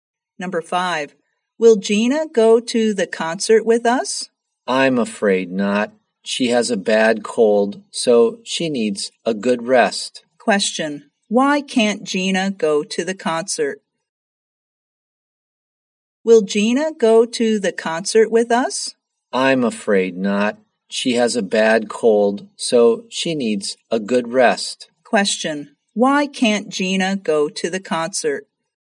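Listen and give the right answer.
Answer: She has a bad cold.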